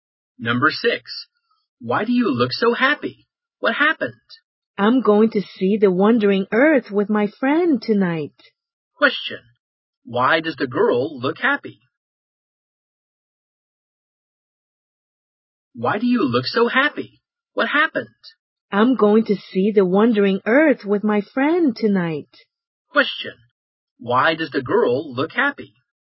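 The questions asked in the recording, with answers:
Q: why does the girl look happy?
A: She is going to see The Wandering Earth with her friend tonight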